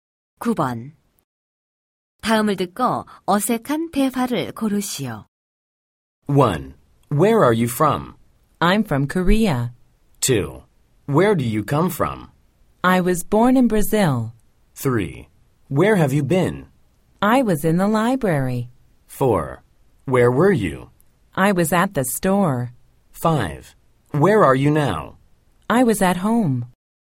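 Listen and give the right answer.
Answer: 5: Where are you now? I was at home.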